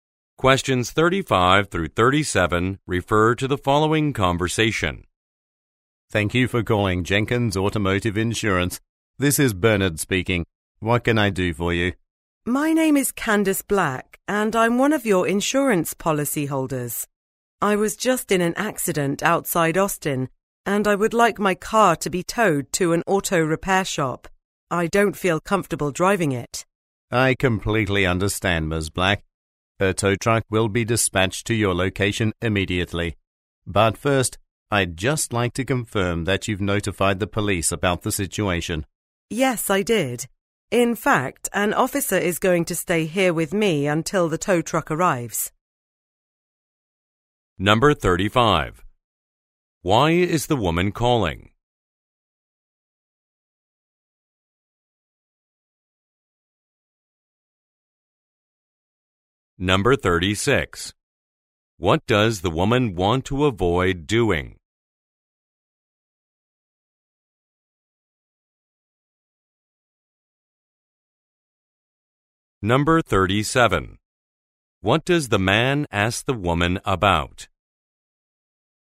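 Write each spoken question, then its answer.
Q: Why is the woman calling?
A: To request a tow truck after an accident

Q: What does the woman want to avoid doing?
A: Driving her car

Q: What does the man ask the woman about?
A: Whether she notified the police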